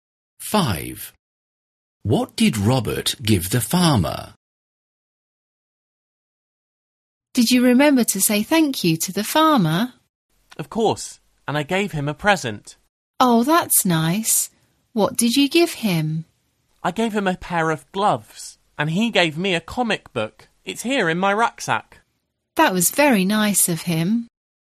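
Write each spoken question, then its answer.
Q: What did Robert give the farmer?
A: a pair of gloves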